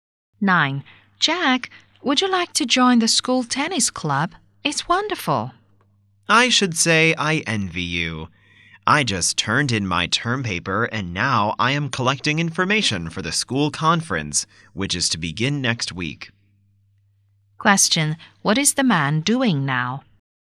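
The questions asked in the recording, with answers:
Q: What is the man doing now?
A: Collecting information for the school conference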